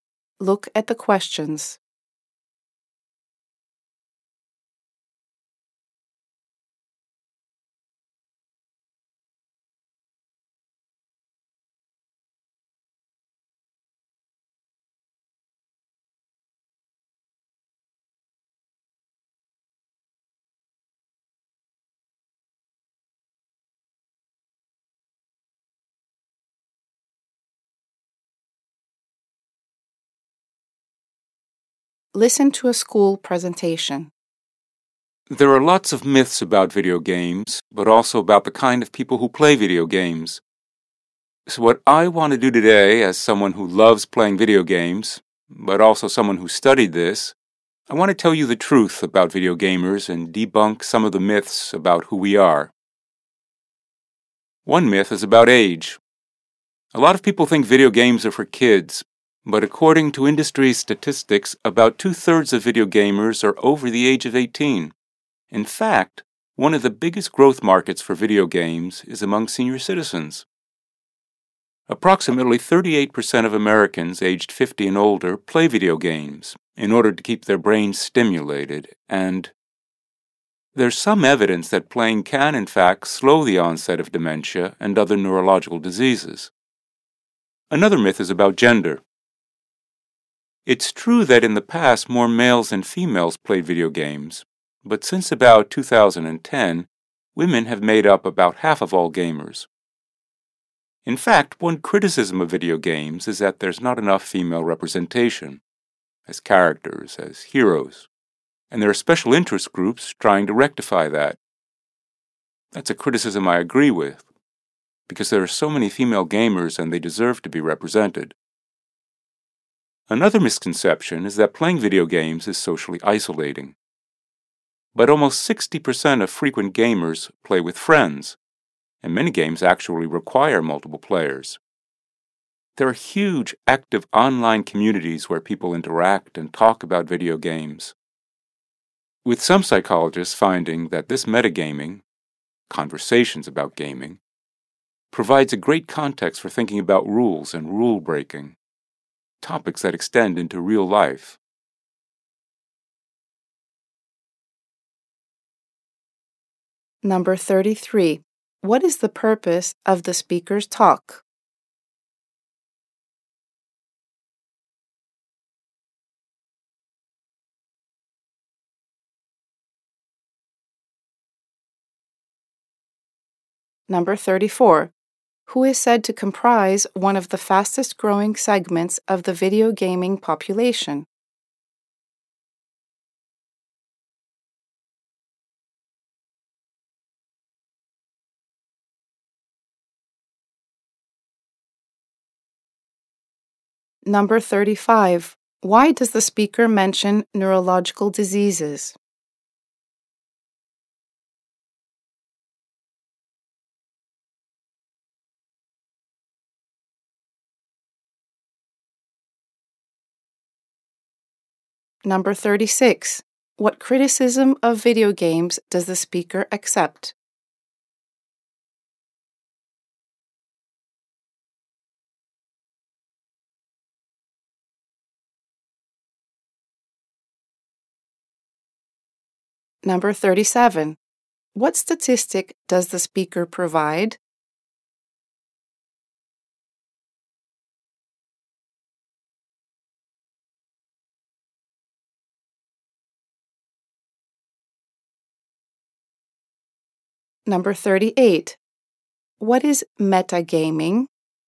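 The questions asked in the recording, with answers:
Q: What is the purpose of the speaker's talk?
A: To debunk myths about who video gamers are

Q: Who is said to comprise one of the fastest growing segments of the video gaming population?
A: Senior citizens

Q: Why does the speaker mention neurological diseases?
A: Playing video games may slow the onset of dementia and other neurological diseases

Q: What criticism of video games does the speaker accept?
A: There is not enough female representation in games

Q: What is metagaming?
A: Conversations about gaming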